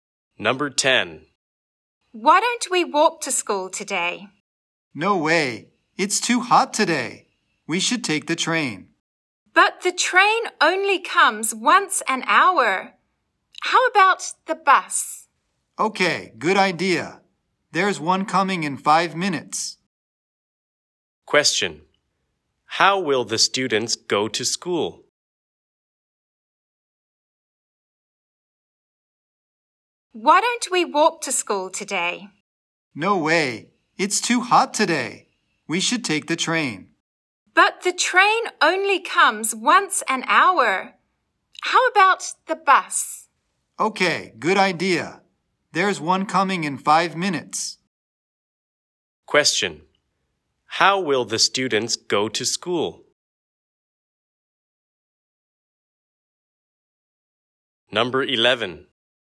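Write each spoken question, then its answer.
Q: How will the students go to school?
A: By bus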